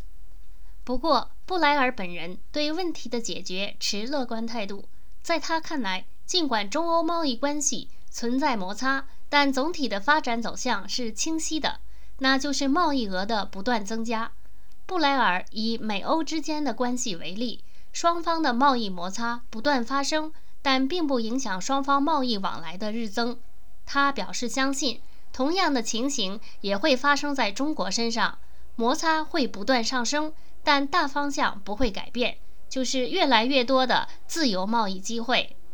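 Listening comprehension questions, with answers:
Please answer the following questions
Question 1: 布莱尔对中欧贸易关系有什么看法?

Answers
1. 持乐观态度:尽管存在摩擦,但总体走向清晰,贸易额不断增加,自由贸易机会越来越多。

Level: 3rd Year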